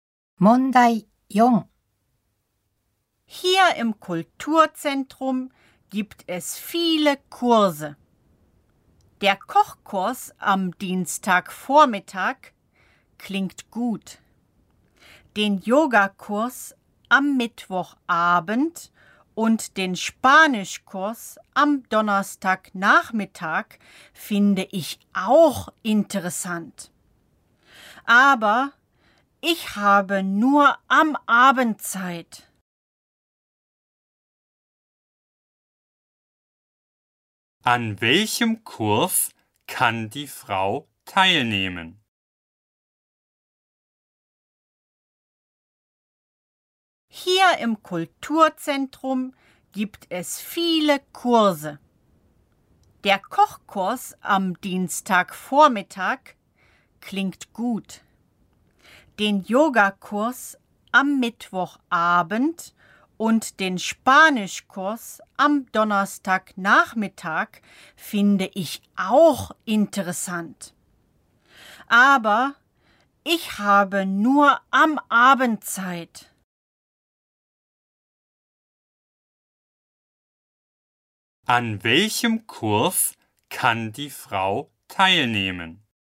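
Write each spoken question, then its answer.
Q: An welchem Kurs kann die Frau teilnehmen?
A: Am Yogakurs (Mittwochabend)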